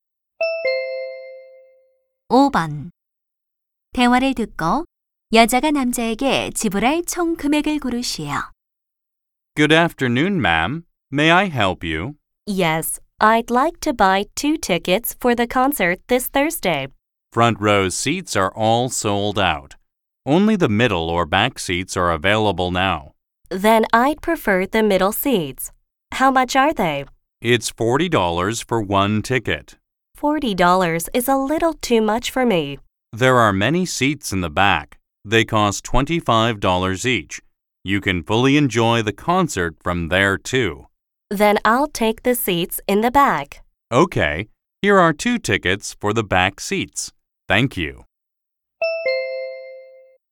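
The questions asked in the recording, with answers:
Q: 대화를 듣고 여자가 남자에게 지불할 총 금액을 고르시오.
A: $50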